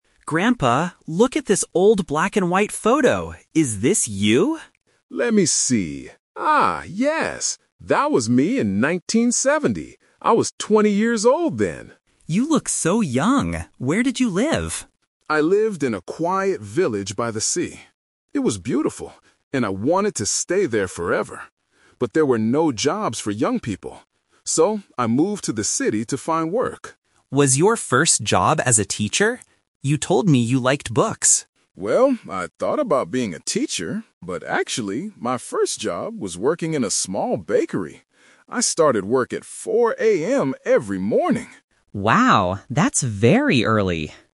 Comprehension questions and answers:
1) Where did the grandfather live when he was twenty?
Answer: In a village near the ocean.

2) Why did the grandfather move to the city?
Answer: Because he needed to find a job.

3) What was his very first job?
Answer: A baker.

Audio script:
Grandson: Grandpa, look at this old black and white photo! Is this you?
Grandfather: Let me see... ah, yes! That was me in 1970. I was twenty years old then.
Grandson: You look so young! Where did you live?
Grandfather: I lived in a quiet village by the sea. It was beautiful, and I wanted to stay there forever. But there were no jobs for young people. So, I moved to the city to find work.
Grandson: Was your first job as a teacher? You told me you liked books.
Grandfather: Well, I thought about being a teacher, but actually, my first job was working in a small bakery. I started work at 4 a.m. every morning!